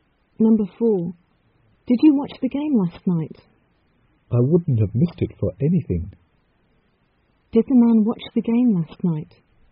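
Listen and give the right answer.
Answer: Yes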